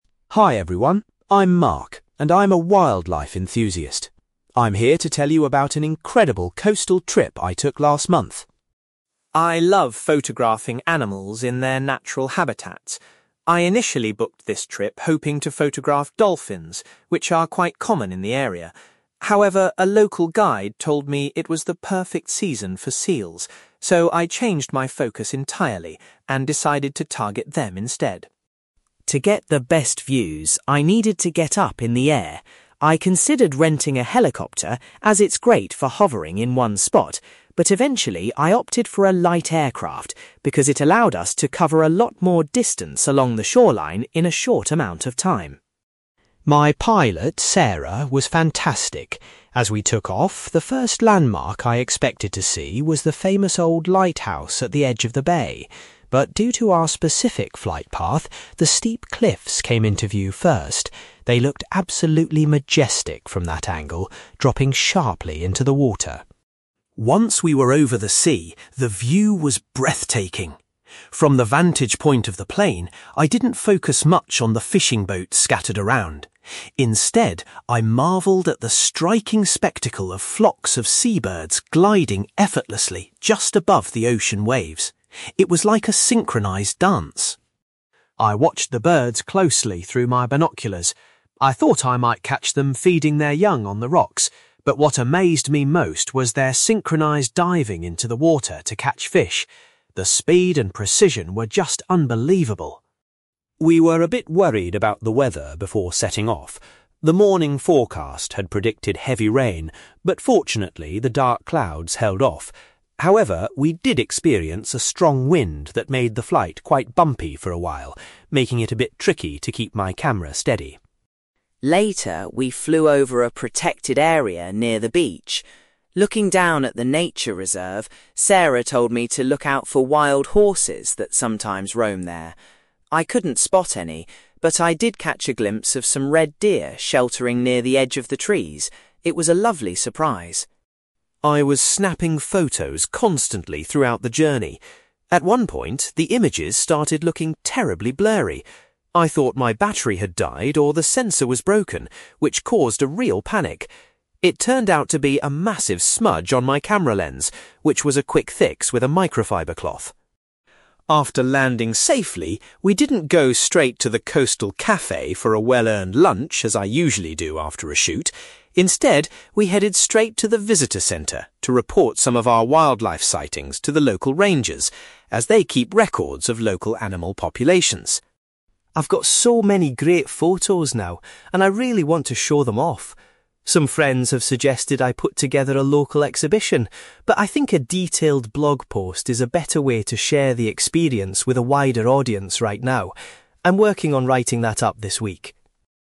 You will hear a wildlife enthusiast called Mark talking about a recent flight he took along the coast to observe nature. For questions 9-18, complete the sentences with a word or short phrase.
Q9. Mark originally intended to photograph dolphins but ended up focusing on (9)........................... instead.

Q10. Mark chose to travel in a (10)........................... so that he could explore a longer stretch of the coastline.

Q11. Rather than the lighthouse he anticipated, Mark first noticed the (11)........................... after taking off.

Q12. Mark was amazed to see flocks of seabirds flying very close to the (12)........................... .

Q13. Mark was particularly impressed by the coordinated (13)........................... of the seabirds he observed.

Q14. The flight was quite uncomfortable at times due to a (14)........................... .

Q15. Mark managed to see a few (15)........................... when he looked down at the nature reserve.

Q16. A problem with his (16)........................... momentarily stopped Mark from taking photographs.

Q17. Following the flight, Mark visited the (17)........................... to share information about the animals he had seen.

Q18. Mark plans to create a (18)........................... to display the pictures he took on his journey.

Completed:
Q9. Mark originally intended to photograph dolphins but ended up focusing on seals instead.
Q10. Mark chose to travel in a light aircraft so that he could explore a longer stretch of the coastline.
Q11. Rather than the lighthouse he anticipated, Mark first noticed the steep cliffs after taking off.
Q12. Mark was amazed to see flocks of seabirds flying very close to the ocean waves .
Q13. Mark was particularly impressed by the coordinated diving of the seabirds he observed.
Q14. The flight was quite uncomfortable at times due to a strong wind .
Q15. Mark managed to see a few red deer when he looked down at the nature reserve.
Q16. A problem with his camera lens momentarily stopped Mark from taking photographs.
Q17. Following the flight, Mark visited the visitor centre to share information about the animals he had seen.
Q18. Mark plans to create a blog post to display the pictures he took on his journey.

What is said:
Mark: Hi everyone, I'm Mark, and I'm a wildlife enthusiast. I'm here to tell you about an incredible coastal trip I took last month.
I love photographing animals in their natural habitats. I initially booked this trip hoping to photograph dolphins, which are quite common in the area. However, a local guide told me it was the perfect season for seals, so I changed my focus entirely and decided to target them instead.
To get the best views, I needed to get up in the air. I considered renting a helicopter, as it's great for hovering in one spot, but eventually, I opted for a light aircraft because it allowed us to cover a lot more distance along the shoreline in a short amount of time.
My pilot, Sarah, was fantastic. As we took off, the first landmark I expected to see was the famous old lighthouse at the edge of the bay. But due to our specific flight path, the steep cliffs came into view first. They looked absolutely majestic from that angle, dropping sharply into the water.
Once we were over the sea, the view was breathtaking. From the vantage point of the plane, I didn't focus much on the fishing boats scattered around. Instead, I marvelled at the striking spectacle of flocks of seabirds gliding effortlessly just above the ocean waves. It was like a synchronized dance.
I watched the birds closely through my binoculars. I thought I might catch them feeding their young on the rocks, but what amazed me most was their synchronized diving into the water to catch fish. The speed and precision were just unbelievable.
We were a bit worried about the weather before setting off. The morning forecast had predicted heavy rain, but fortunately, the dark clouds held off. However, we did experience a strong wind that made the flight quite bumpy for a while, making it a bit tricky to keep my camera steady.
Later, we flew over a protected area near the beach. Looking down at the nature reserve, Sarah told me to look out for wild horses that sometimes roam there. I couldn't spot any, but I did catch a glimpse of some red deer sheltering near the edge of the trees. It was a lovely surprise.
I was snapping photos constantly throughout the journey. At one point, the images started looking terribly blurry. I thought my battery had died or the sensor was broken, which caused a real panic. It turned out to be a massive smudge on my camera lens, which was a quick fix with a microfiber cloth!
After landing safely, we didn't go straight to the coastal cafe for a well-earned lunch as I usually do after a shoot. Instead, we headed straight to the visitor centre to report some of our wildlife sightings to the local rangers, as they keep records of local animal populations.
I've got so many great photos now, and I really want to show them off. Some friends have suggested I put together a local exhibition, but I think a detailed blog post is a better way to share the experience with a wider audience right now. I'm working on writing that up this week!

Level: B2